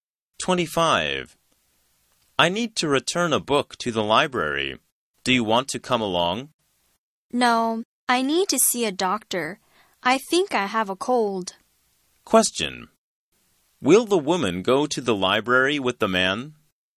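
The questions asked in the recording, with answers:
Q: Will the woman go to the library with the man?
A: No, she needs to see a doctor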